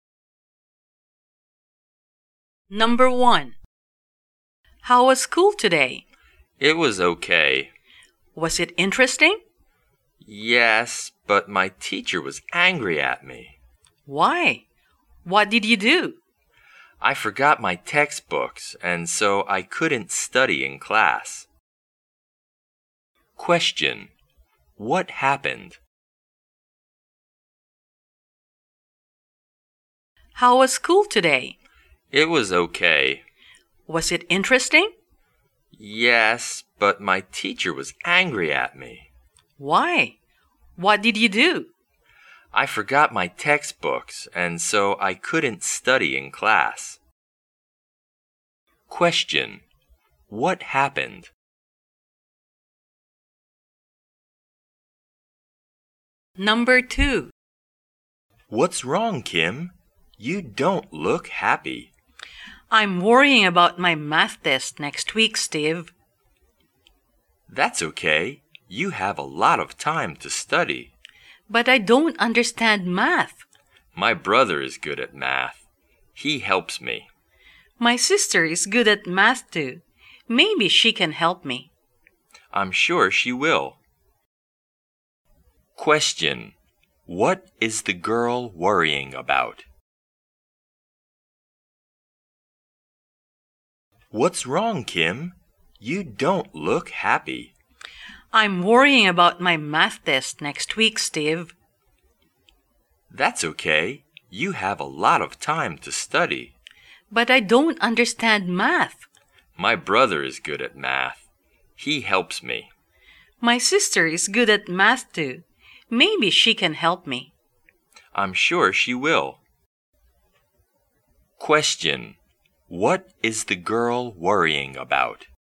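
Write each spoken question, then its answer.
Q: What happened?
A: The teacher got angry because the student forgot the textbooks

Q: What is the girl worrying about?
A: Her math test next week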